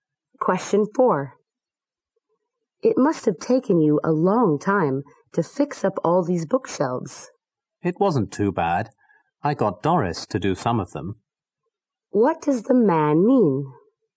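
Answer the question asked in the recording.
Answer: Doris helped him fix some of the bookshelves.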